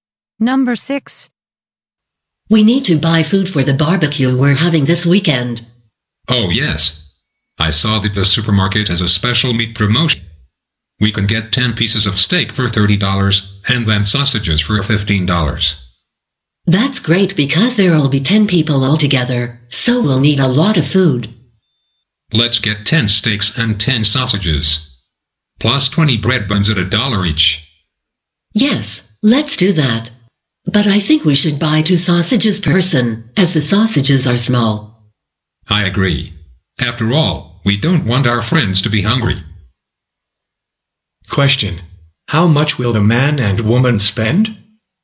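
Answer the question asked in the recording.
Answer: $80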